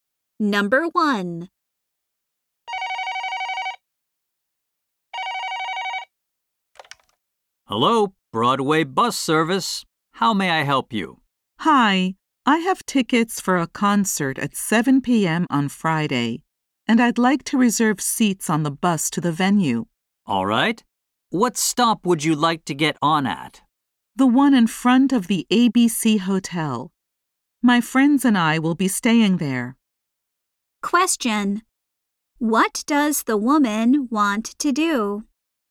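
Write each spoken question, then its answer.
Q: What does the woman want to do?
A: Reserve bus seats to the concert venue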